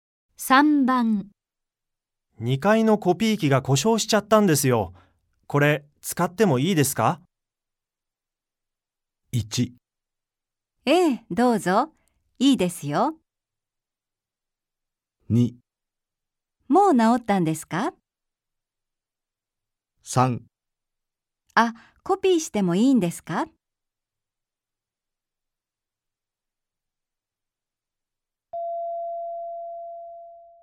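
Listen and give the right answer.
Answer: 1: ええ、どうぞ。いいですよ。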